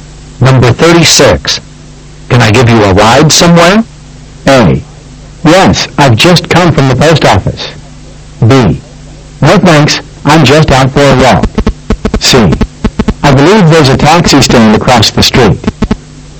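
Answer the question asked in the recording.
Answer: B: No thanks, I'm just out for a walk.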